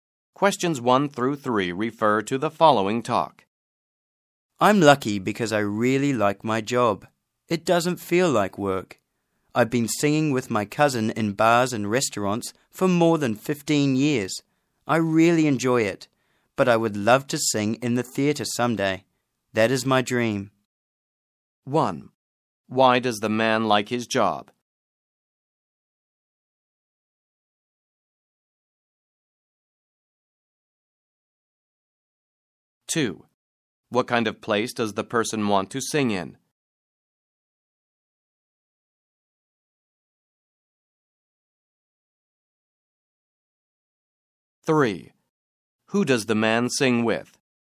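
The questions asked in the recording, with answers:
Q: Why does the man like his job?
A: It doesn't feel like work

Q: What kind of place does the person want to sing in?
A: The theatre

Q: Who does the man sing with?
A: His cousin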